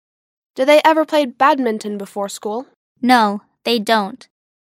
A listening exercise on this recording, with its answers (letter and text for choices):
«با توجه به فایل صوتی، گزینه مناسب را انتخاب کنید»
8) Do they ever play badminton before school?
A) Yes, they do.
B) No, they don't.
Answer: B) No, they don't.